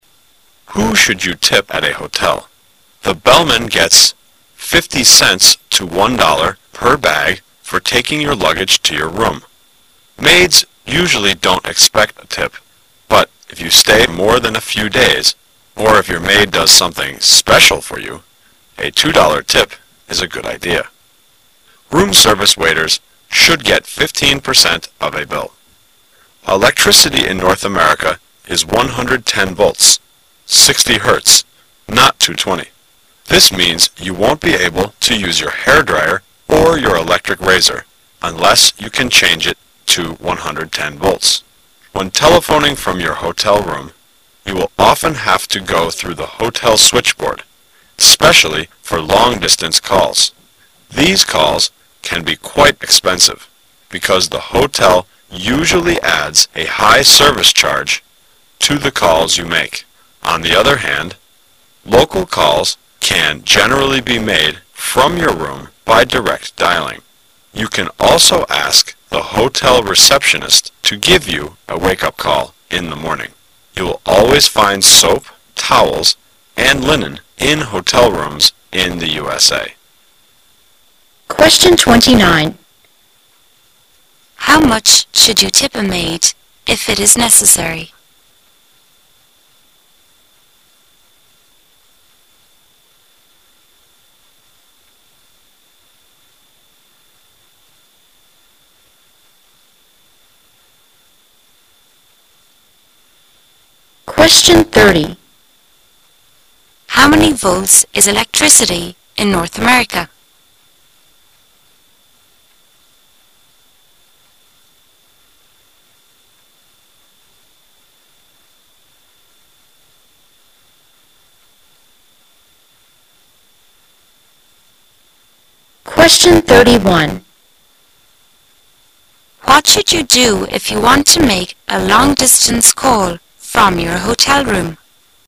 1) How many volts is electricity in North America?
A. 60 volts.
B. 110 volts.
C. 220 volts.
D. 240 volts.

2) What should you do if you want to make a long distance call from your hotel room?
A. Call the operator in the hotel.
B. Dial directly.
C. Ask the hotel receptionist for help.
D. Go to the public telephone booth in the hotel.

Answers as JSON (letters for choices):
{"1": "B", "2": "A"}

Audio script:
[解析] 29-31 Who should you tip at a hotel? The bellman gets 50 cents to $ 1 per bag for taking your luggage to your room. Maids usually don't expect a tip, but if you stay more than a few days or if your maid does something special for you, a $ 2 tip is a good idea. Room service waiters should get 15% of a bill. Electricity in North America is 110 volts (60 Herz)--not 220. This means you won't be able to use your hair dryer or your electric razor unless you can change it to 110 volts. When telephoning from your hotel room, you will often have to go through the hotel switchboard, specially for long distance calls. These calls can be quite expensive, because the hotel usually adds a high service charge to the calls you make. On the other hand, local calls can generally be made from your room by direct dialing. You can also ask the hotel receptionist to give you a wake-up call in the morning. You will always find soap, towels and linen in hotel rooms in the USA. How much should you tip a maid if it is necessary?